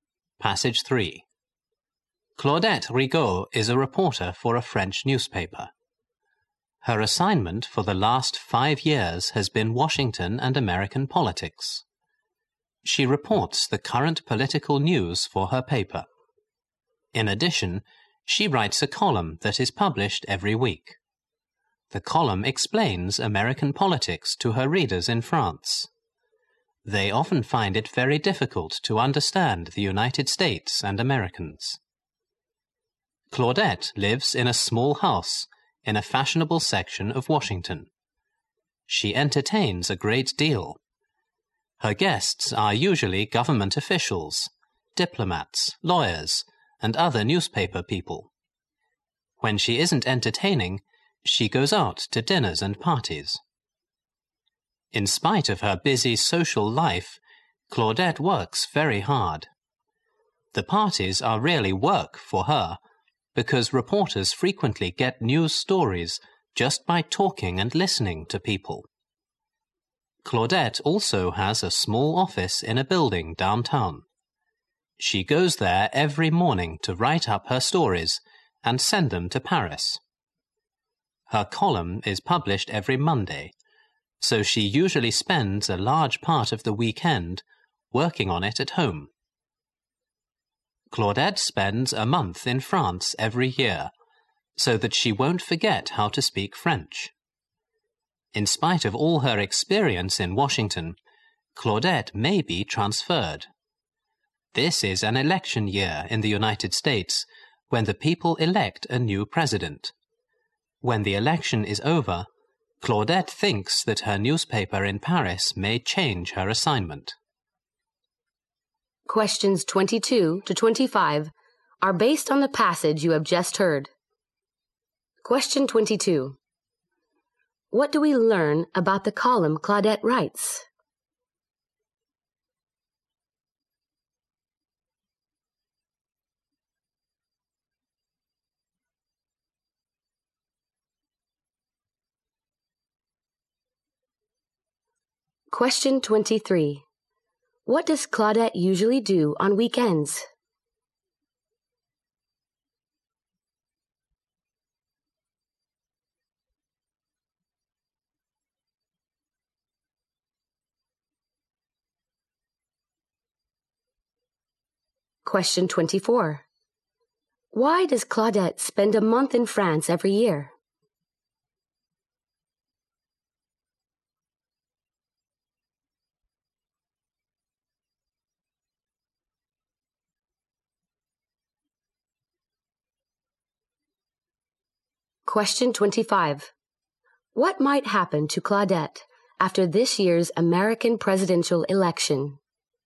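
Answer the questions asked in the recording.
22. It explains American politics to French readers every week.
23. She works on her column at home.
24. So that she won't forget how to speak French.
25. Her newspaper might change her assignment.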